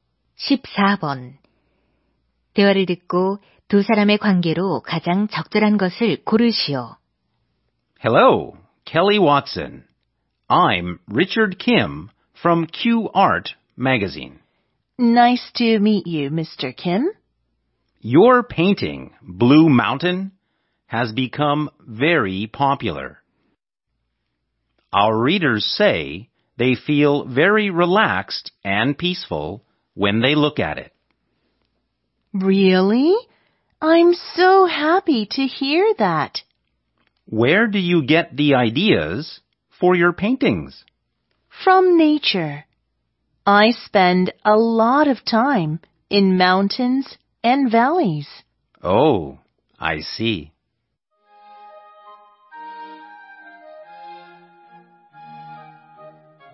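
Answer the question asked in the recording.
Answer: 기자와 화가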